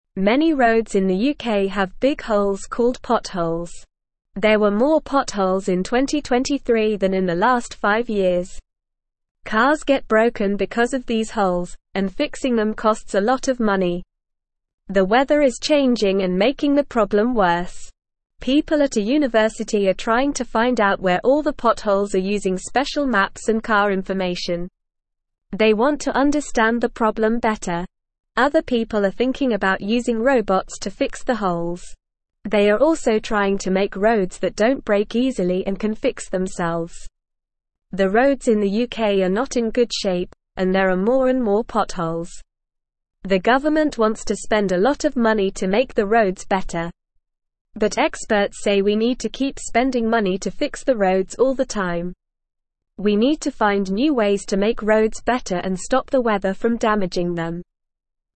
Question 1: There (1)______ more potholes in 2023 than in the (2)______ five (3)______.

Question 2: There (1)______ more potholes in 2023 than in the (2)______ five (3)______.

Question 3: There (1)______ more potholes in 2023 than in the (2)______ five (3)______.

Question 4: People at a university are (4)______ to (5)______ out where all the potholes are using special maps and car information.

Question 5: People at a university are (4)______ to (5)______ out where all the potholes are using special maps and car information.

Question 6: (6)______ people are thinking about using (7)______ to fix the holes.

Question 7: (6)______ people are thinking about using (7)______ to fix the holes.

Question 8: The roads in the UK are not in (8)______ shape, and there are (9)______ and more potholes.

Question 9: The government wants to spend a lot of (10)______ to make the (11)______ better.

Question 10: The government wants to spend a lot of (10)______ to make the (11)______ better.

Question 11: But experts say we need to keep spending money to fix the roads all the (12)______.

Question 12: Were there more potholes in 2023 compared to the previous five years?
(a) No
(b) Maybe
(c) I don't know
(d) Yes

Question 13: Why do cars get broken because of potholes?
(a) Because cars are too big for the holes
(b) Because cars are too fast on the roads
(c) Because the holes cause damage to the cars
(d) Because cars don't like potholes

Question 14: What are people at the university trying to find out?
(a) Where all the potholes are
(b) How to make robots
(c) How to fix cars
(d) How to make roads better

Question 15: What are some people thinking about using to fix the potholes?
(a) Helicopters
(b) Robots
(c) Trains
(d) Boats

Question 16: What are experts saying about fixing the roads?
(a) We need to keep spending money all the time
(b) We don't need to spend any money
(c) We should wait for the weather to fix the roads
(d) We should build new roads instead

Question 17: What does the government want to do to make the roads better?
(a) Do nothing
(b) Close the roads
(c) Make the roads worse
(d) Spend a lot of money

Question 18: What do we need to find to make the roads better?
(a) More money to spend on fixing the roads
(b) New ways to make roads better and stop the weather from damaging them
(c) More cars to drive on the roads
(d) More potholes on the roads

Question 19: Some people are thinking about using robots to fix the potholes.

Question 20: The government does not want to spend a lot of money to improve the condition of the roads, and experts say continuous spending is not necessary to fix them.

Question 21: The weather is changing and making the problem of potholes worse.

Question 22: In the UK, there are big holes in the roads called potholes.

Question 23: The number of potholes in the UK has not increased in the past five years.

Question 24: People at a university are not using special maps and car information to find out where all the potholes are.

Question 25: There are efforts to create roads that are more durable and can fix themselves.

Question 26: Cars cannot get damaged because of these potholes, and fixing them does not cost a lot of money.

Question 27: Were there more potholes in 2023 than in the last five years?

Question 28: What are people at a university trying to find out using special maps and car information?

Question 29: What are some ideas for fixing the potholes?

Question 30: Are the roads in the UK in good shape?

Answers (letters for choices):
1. were
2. last
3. years
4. trying
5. find
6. Other
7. robots
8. good
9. money
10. roads
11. time
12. d
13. c
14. a
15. b
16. a
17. d
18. b
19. True
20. False
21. True
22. True
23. False
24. False
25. True
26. False
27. Yes, there were more potholes in 2023 than in the last five years.
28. People at a university are trying to find out where all the potholes are using special maps and car information.
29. Some ideas for fixing the potholes are using robots to fix them and making roads that don't break easily and can fix themselves.
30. No, the roads in the UK are not in good shape.

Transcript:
Many roads in the UK have big holes called potholes. There were more potholes in 2023 than in the last five years. Cars get broken because of these holes, and fixing them costs a lot of money. The weather is changing and making the problem worse.
People at a university are trying to find out where all the potholes are using special maps and car information. They want to understand the problem better. Other people are thinking about using robots to fix the holes. They are also trying to make roads that don't break easily and can fix themselves.
The roads in the UK are not in good shape, and there are more and more potholes. The government wants to spend a lot of money to make the roads better. But experts say we need to keep spending money to fix the roads all the time. We need to find new ways to make roads better and stop the weather from damaging them.

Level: Level 2